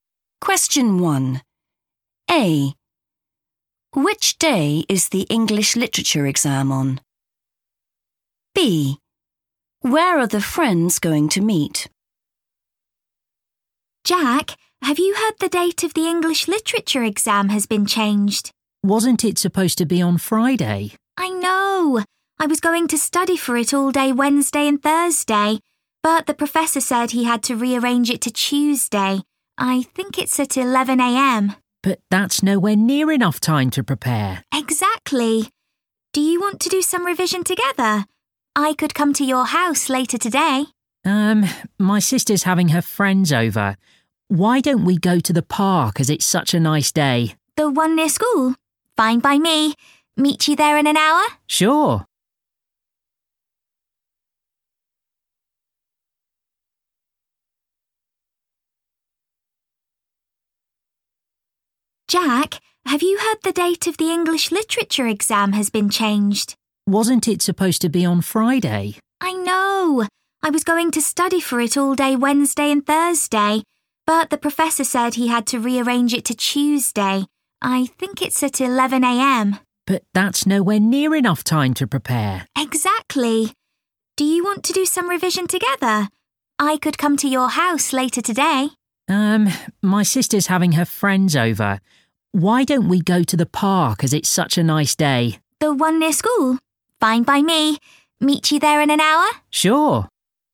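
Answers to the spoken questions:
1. Tuesday
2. the park near school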